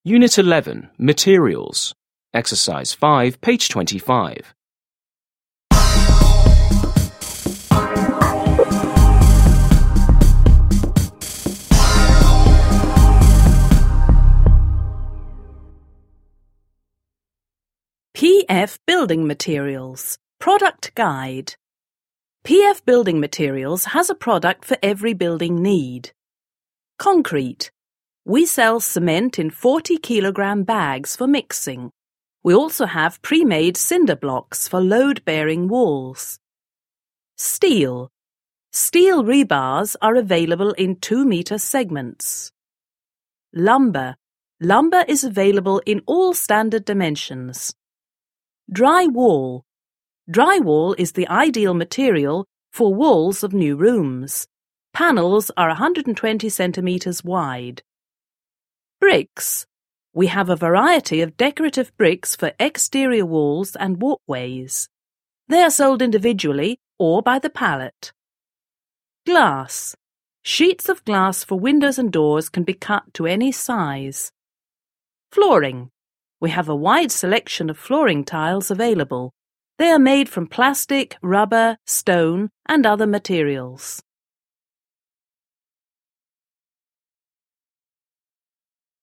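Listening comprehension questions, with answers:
5. Listen and read the flyer for a materials supplier again. What are materials that can be used in floors?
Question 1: What are materials that can be used in floors?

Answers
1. plastic, rubber, stone and other materials

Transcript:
PF Building Materials
Product Guide
PF Building Materials has a product for every building need.
Concrete: We sell cement in 40 kilogram bags for mixing. We also have pre-made cinderblocks for load-bearing walls.
Lumber: Lumber is available in all standard dimensions.
Drywall: Drywall is the ideal material for walls of new rooms. Panels are 120 cm wide.
Bricks: We have a variety of decorative bricks for exterior walls and walkways. They are sold individually or by the pallet.
Glass: Sheets of glass for windows and doors can be cut to any size.
Flooring: We have a wide selection of flooring tiles available. They are made from plastic, rubber, stone, and other materials.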